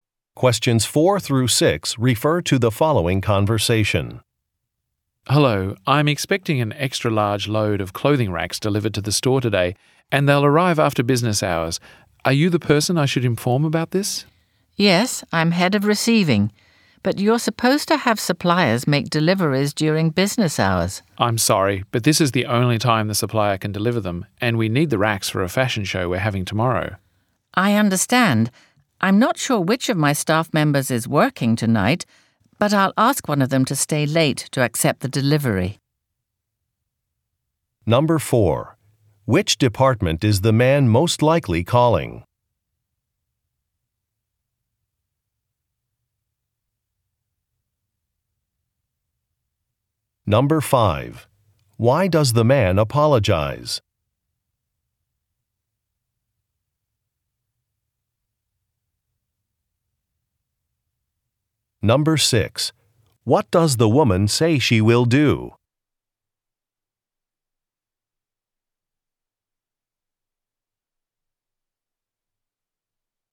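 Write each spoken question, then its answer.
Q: Which department is the man most likely calling?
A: The receiving department

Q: Why does the man apologize?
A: The delivery will arrive after business hours

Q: What does the woman say she will do?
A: Ask a staff member to stay late to accept the delivery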